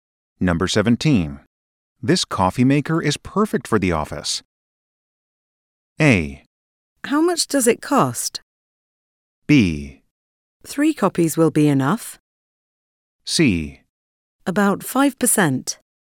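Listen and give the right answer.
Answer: A: How much does it cost?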